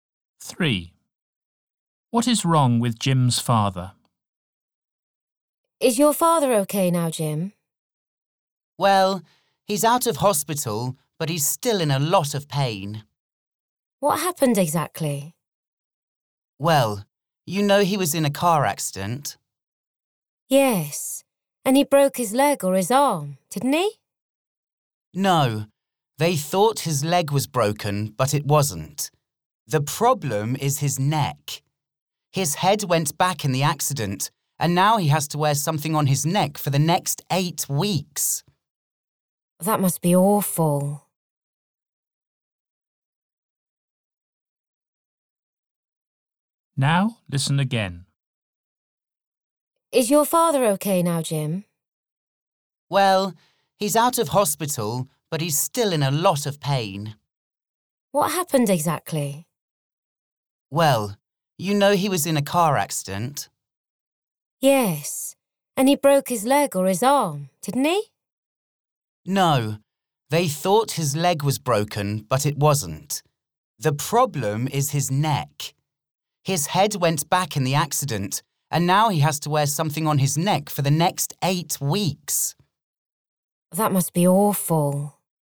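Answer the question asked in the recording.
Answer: He has hurt his neck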